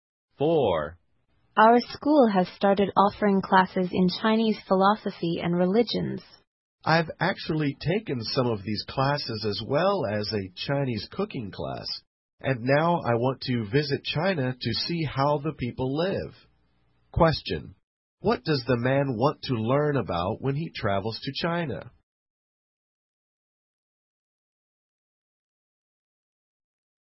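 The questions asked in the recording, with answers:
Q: what does the man want to learn about when he travels to China?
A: How the people live.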